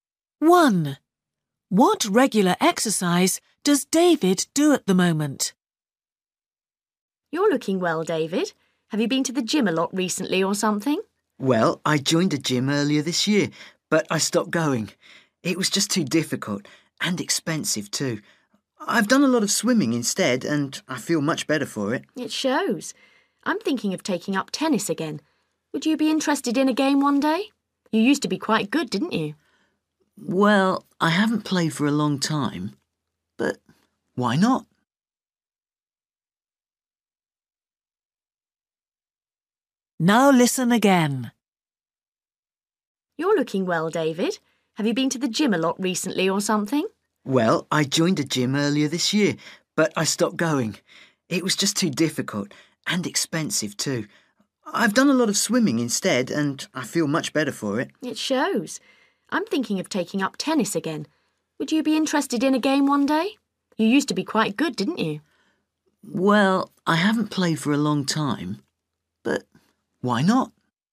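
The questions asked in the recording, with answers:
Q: What regular exercise does David do at the moment?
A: swimming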